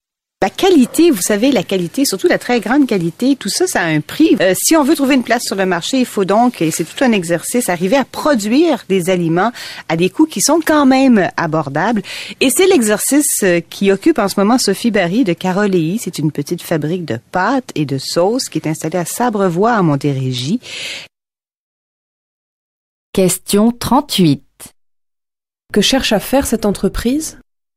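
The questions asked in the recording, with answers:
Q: Que cherche à faire cette entreprise?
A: Produire des aliments de qualité à un prix abordable.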